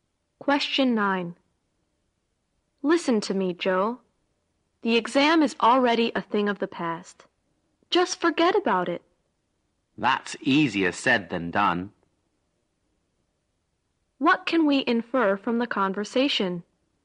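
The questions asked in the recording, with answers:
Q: What can we infer from the conversation?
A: Joe can't stop worrying about the exam.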